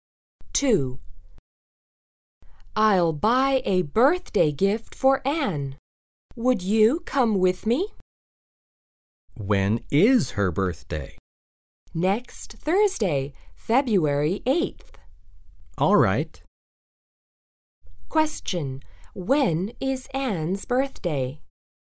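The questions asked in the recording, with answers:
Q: When is Anne's birthday?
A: Next Thursday, February 8th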